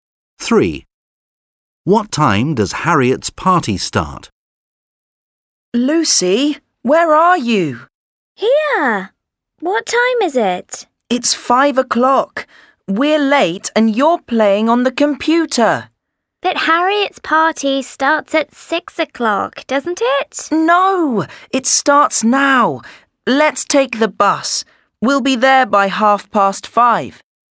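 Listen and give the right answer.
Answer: 5 o'clock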